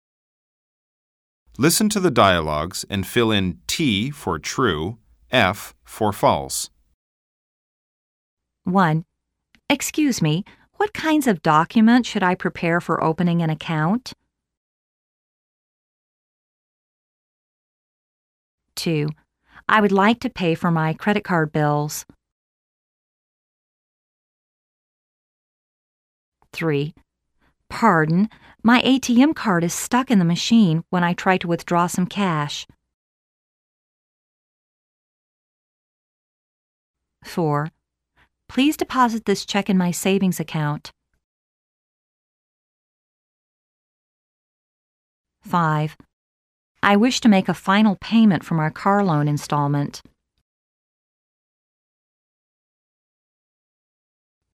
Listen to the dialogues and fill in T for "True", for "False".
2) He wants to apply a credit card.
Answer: F